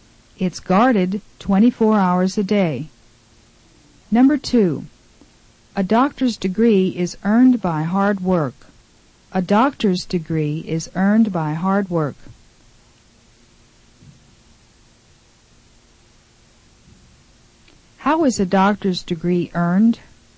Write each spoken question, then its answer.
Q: How is a doctor's degree earned?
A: It's earned by hard work.